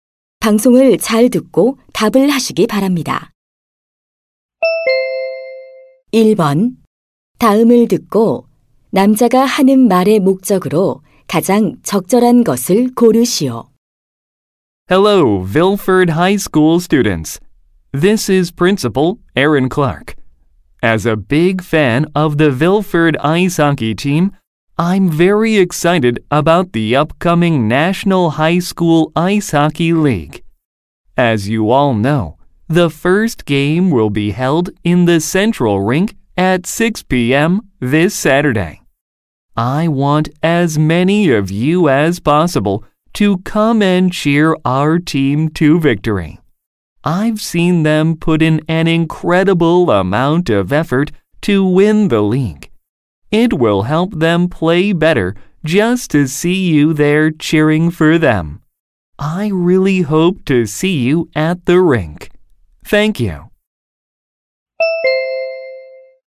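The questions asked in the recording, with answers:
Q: 다음을 듣고 남자가 하는 말의 목적으로 가장 적절한 것을 고르시오.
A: 아이스하키 팀 경기에 와서 응원해 줄 것을 독려하려고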